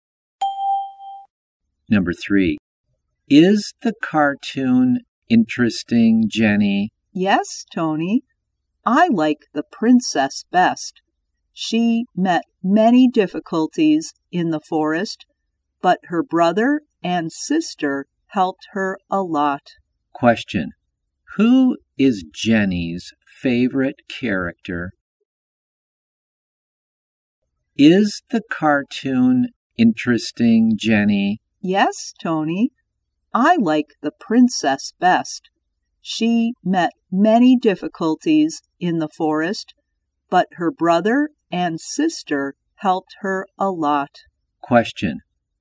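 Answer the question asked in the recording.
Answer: The princess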